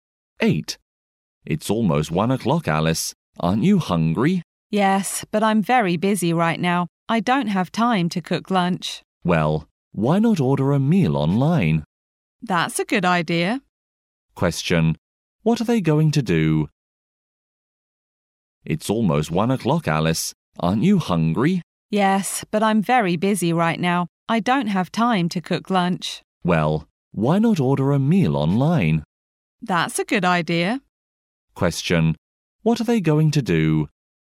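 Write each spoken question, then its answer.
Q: What are they going to do?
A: Order a meal online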